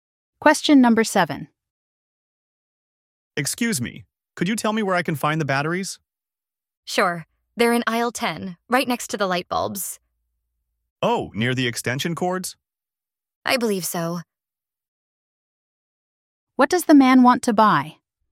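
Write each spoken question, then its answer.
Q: What does the man want to buy?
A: Batteries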